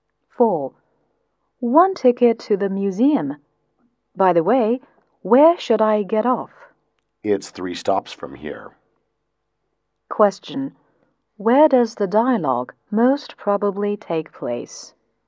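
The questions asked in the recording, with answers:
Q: Where does the dialogue most probably take place?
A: On a bus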